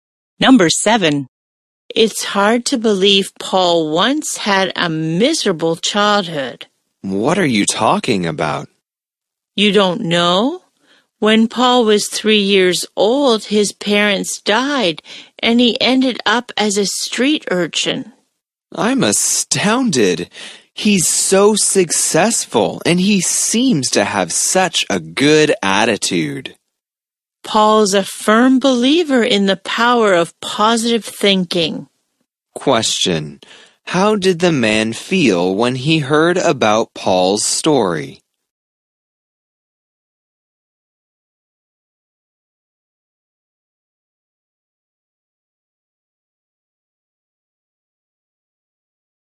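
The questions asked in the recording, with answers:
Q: Question. How did the man feel when he heard about Paul's story?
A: Astounded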